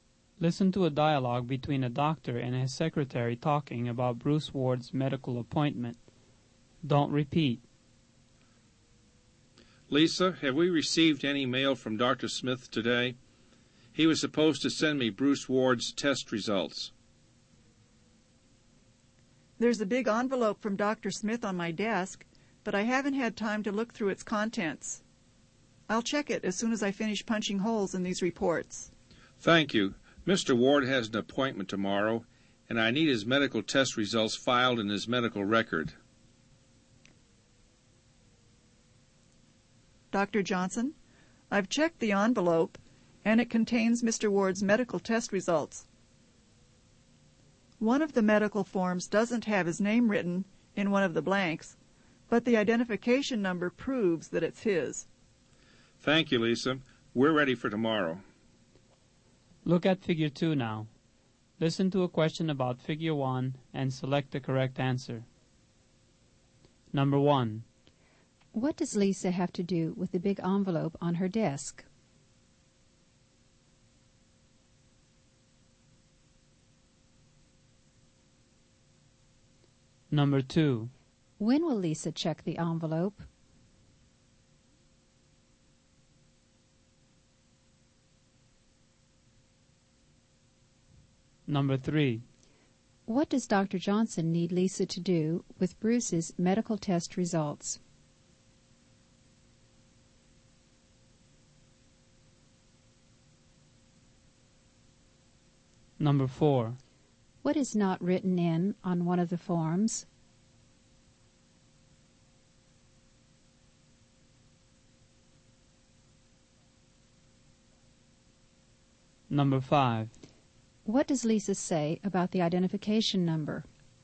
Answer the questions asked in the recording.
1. She has to look through the envelope's contents.
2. She'll check it after she finishes punching holes in the reports.
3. Johnson needs her to file them in Mr.
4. Mr. Ward's name isn't written in one of the blanks.
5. She says it proves the medical form is Mr.